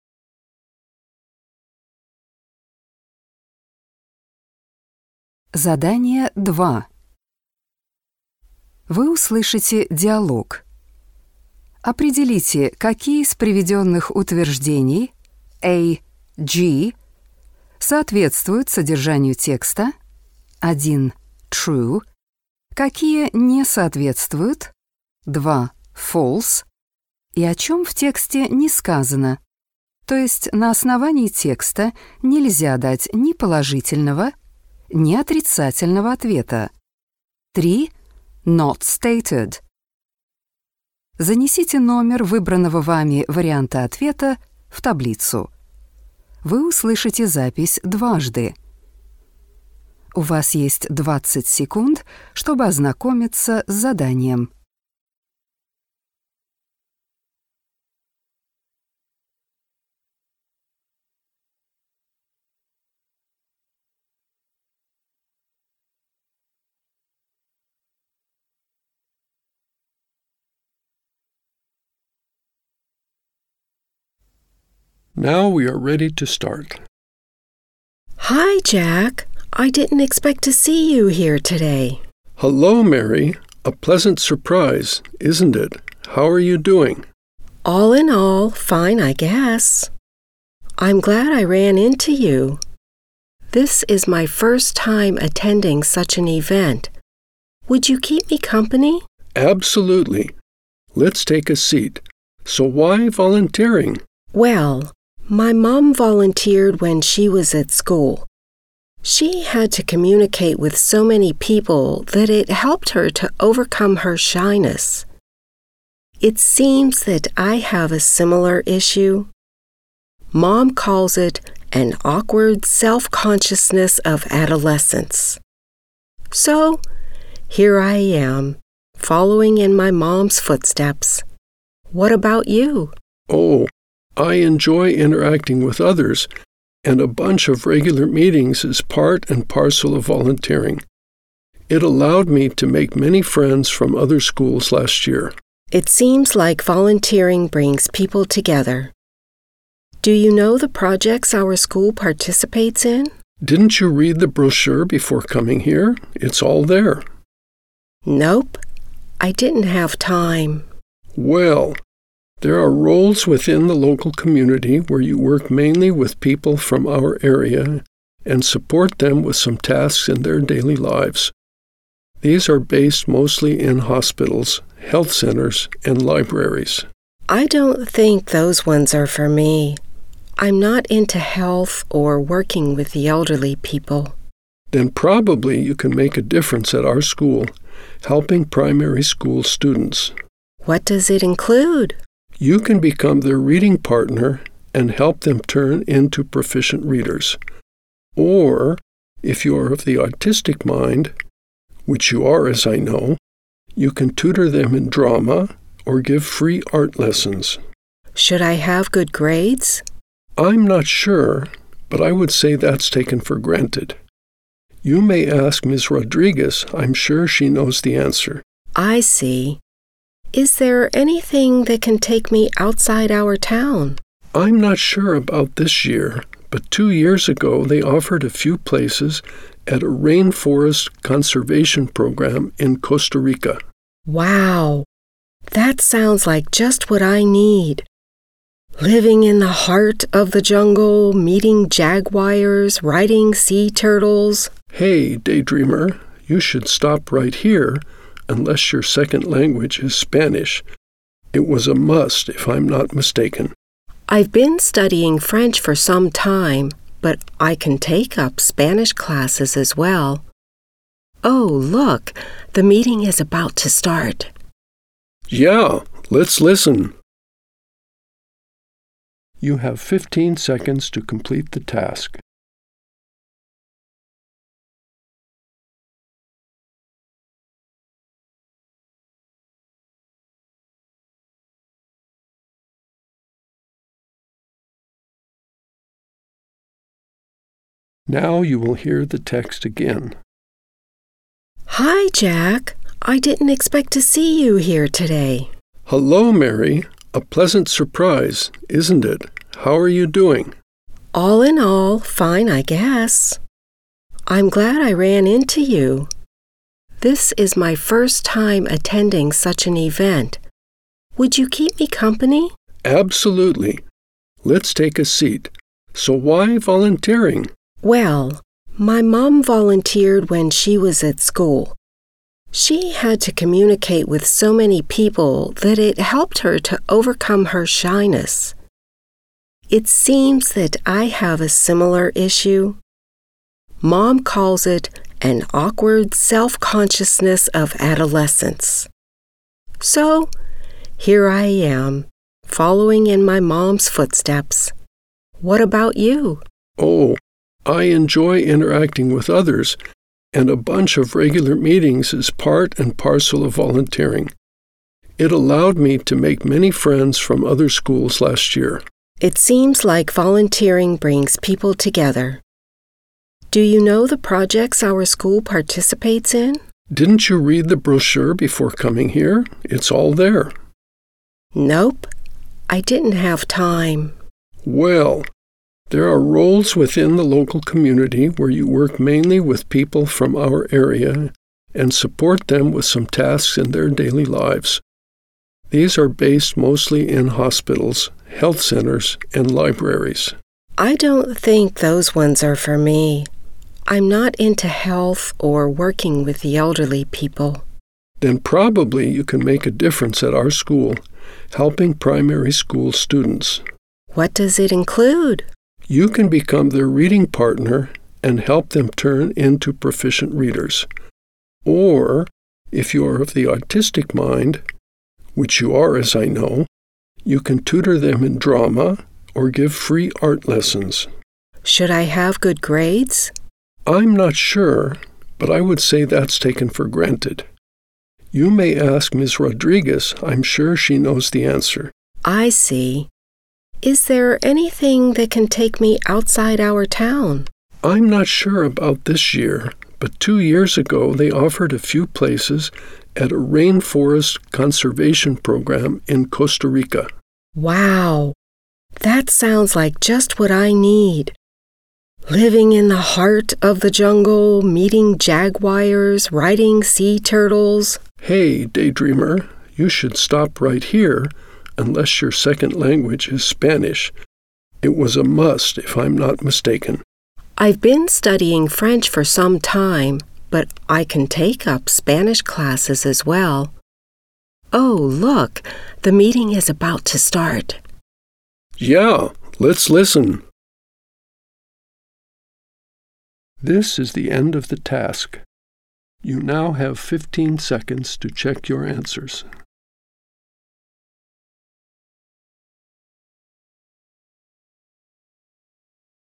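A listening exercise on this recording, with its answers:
Вы услышите диалог. Определите, какие из приведённых утверждений А-G соответствуют содержанию текста (1 - True), какие не соответствуют (2 - False) и о чём в тексте не сказано, то есть на основании текста нельзя дать ни положительного, ни отрицательного ответа (3 - Not stated). Запишите ответ последовательностью из 7 цифр. Вы услышите запись дважды.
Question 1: Mary and Jack came together to the meeting.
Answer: False

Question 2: Volunteering helped Mary's mom to become more confident.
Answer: True

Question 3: Jack's dad used to be a volunteer while at school.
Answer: Not stated

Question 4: Volunteering helped Jack to make new friends.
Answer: True

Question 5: Mary read the leaflet from cover to cover.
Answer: False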